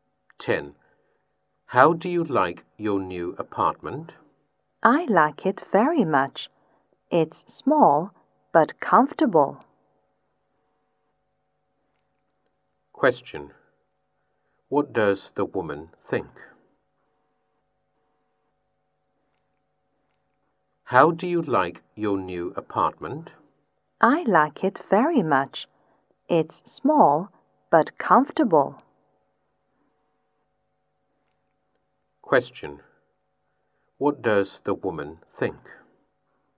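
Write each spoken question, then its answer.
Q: What does the woman think?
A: Her new apartment is small but comfortable; she likes it very much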